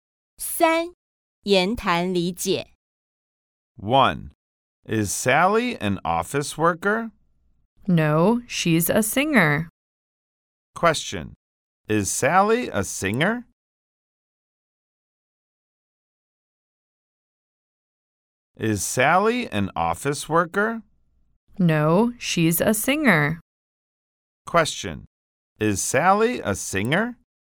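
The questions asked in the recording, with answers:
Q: Question, is Sally a singer?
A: Yes, she is.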